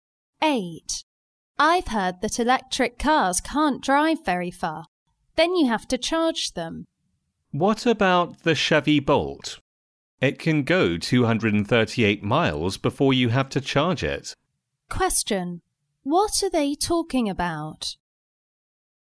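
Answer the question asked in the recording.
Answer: Electric cars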